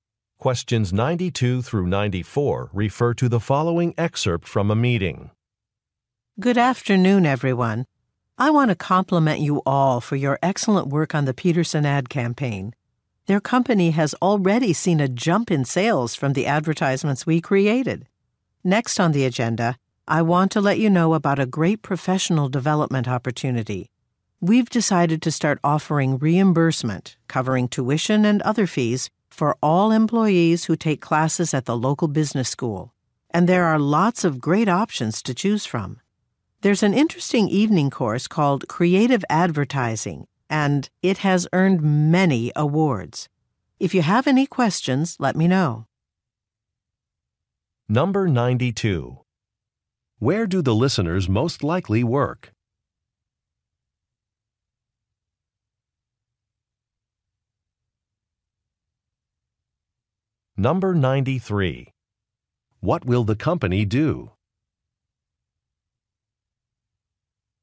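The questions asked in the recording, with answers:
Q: Where do the listeners most likely work?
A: At an advertising agency

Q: What will the company do?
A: Reimburse employees for business school classes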